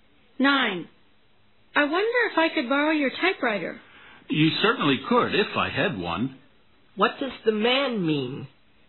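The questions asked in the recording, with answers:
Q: What does the man mean?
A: He doesn't have a typewriter.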